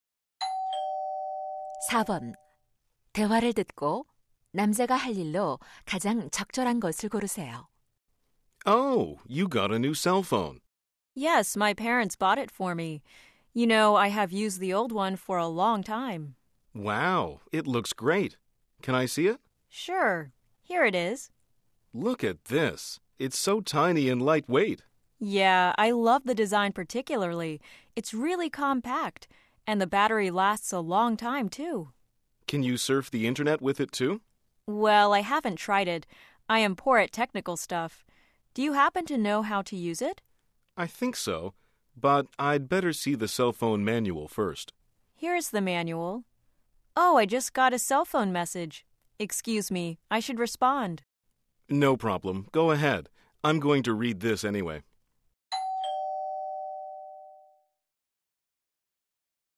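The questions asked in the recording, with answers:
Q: 대화를 듣고 남자가 할 일로 가장 적절한 것을 고르세요.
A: 휴대전화 사용 설명서 읽기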